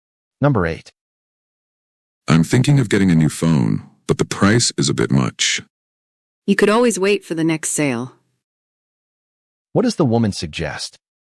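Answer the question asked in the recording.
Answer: Waiting for the next sale to buy the phone.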